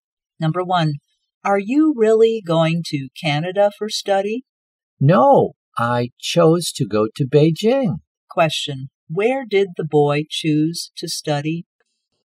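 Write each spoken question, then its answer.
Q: Where did the boy choose to study?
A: In Beijing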